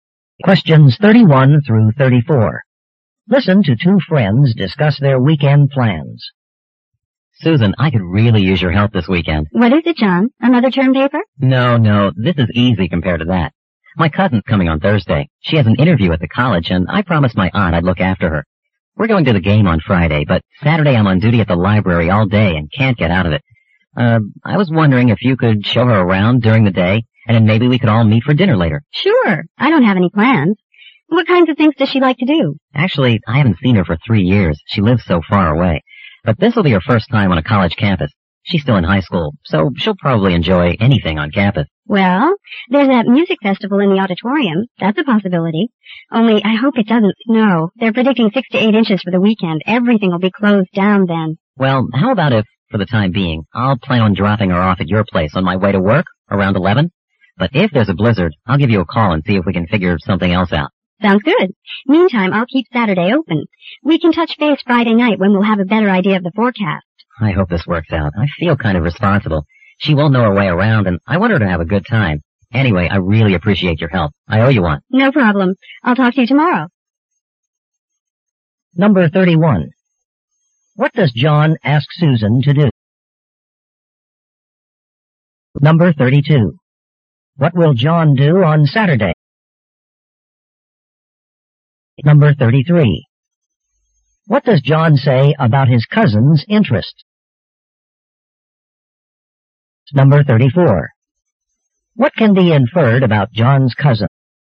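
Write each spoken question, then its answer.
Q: What does John ask Susan to do?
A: Show his cousin around campus on Saturday.

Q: What will John do on Saturday?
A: Work at the library.

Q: What does John say about his cousin's interest?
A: She'll probably enjoy anything on campus.

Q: What can be inferred about John's cousin?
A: She's a high school student visiting a college campus for the first time.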